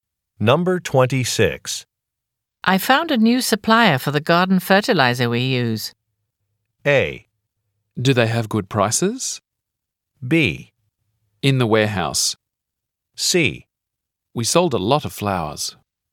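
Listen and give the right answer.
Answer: A: Do they have good prices?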